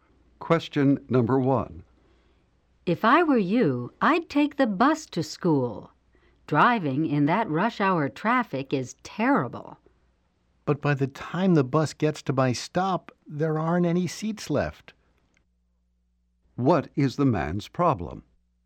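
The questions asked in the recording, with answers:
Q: What is the man's problem?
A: There are no seats left on the bus when it reaches his stop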